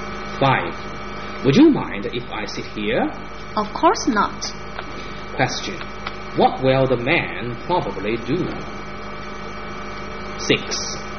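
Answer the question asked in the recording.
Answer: Sit down there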